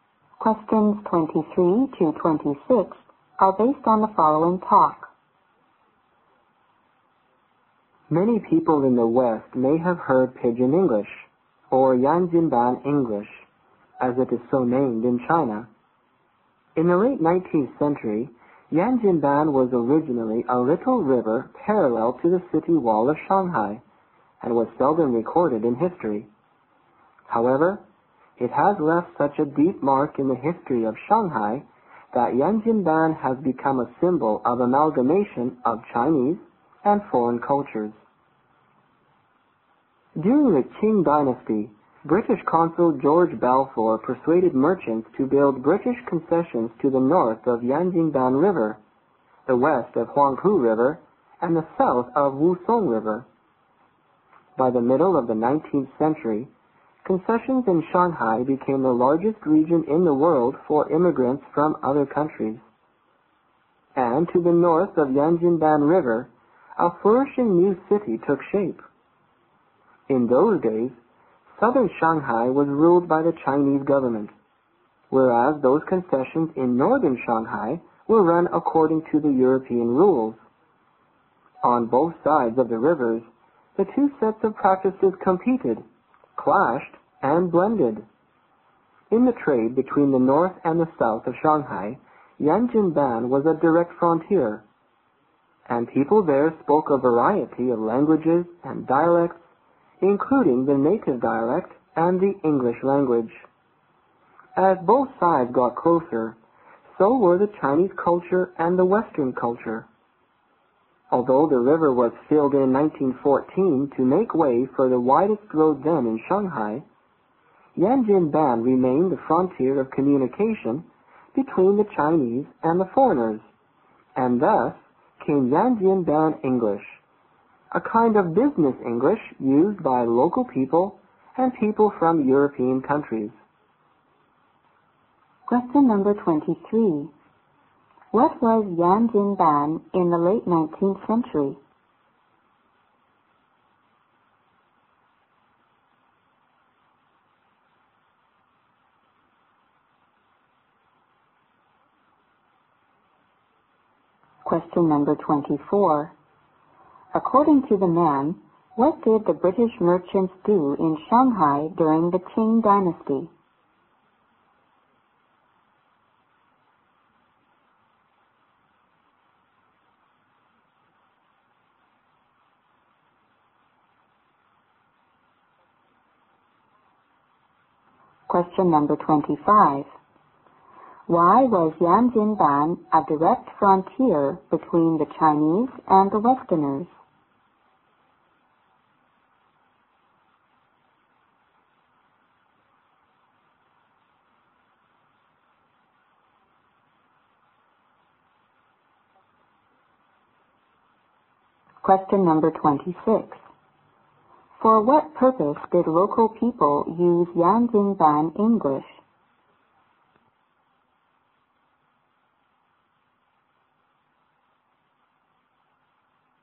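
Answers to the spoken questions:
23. A little river parallel to the Shanghai city wall
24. They built British concessions north of the Yanjinban River
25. Because of the trade between north and south Shanghai
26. For business with Europeans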